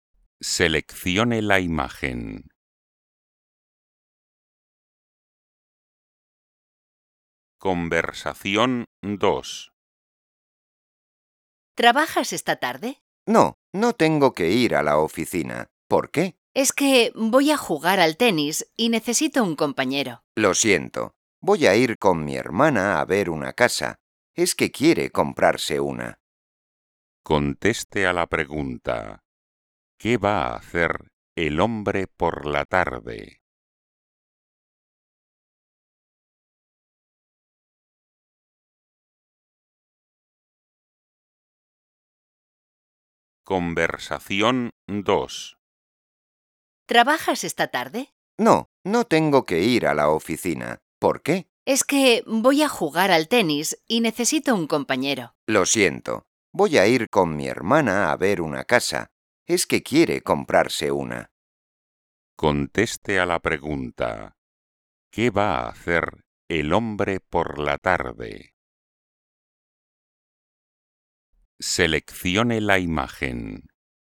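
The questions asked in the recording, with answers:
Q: ¿Qué va a hacer el hombre por la tarde?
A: Ir con su hermana a ver una casa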